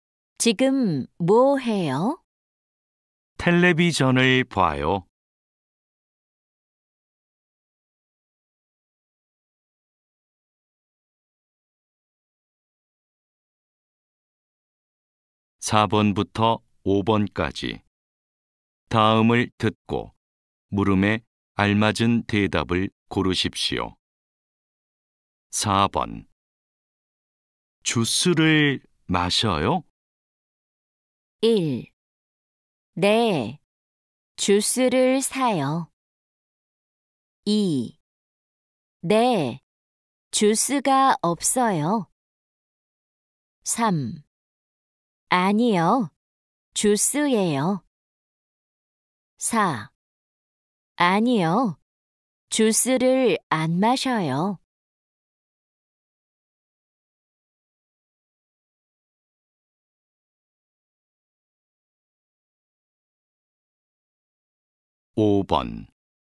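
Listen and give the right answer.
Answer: 4: 아니요, 주스를안마셔요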